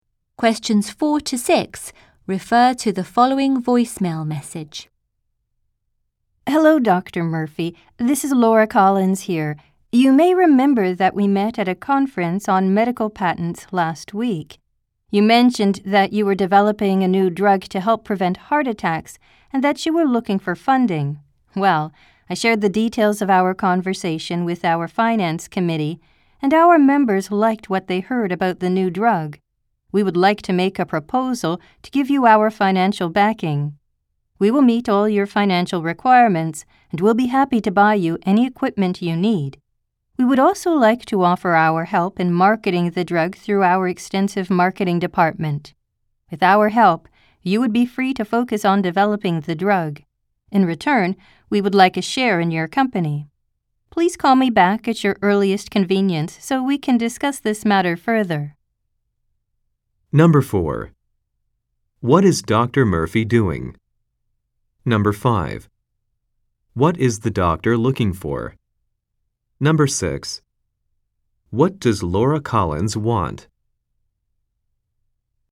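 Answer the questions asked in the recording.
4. Developing a new drug to help prevent heart attacks
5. Funding
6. A share in Dr. Murphy's company in return for financial backing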